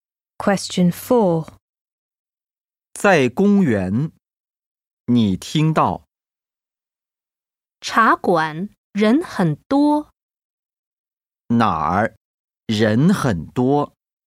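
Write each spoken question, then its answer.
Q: 哪儿人很多?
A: 茶馆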